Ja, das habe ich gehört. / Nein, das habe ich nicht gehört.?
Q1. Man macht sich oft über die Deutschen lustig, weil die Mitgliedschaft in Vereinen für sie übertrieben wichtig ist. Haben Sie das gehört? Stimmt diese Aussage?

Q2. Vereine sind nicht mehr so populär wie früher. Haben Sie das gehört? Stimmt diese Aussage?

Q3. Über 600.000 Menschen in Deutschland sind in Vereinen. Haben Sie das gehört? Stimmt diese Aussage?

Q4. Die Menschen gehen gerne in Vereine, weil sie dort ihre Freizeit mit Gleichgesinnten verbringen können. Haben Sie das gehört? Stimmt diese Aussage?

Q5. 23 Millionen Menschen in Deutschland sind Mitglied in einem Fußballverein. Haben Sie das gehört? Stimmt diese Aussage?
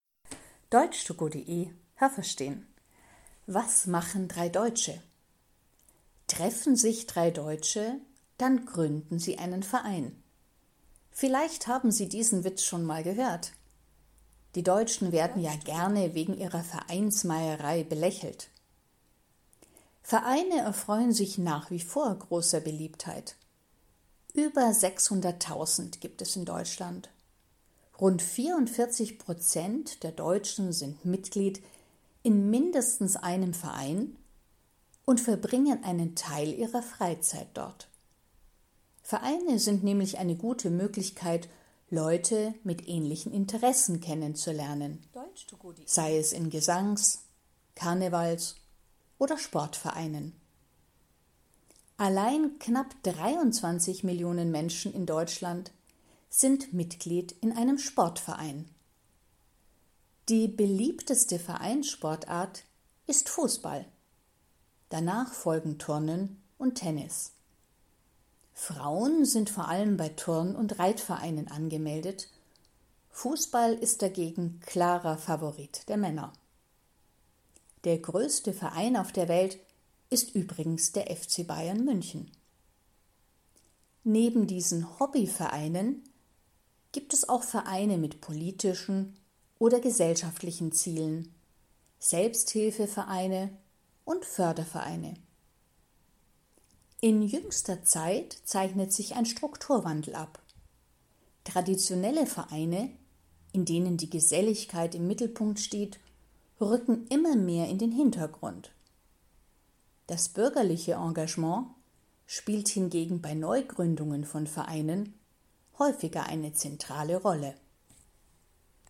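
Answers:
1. Ja, das habe ich gehört.
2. Nein, das habe ich nicht gehört.
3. Nein, das habe ich nicht gehört.
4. Ja, das habe ich gehört.
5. Nein, das habe ich nicht gehört.

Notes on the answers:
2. Vereine erfreuen sich nach wie vor großer Beliebtheit.
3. Es gibt über 600.000 Vereine in Deutschland und 44 % der Deutschen sind mindestens in einem Verein Mitglied. (Das sind ca. 37 Millionen Menschen.)
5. 23 Millionen Menschen in Deutschland sind Mitglied in einem Sportverein.

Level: C1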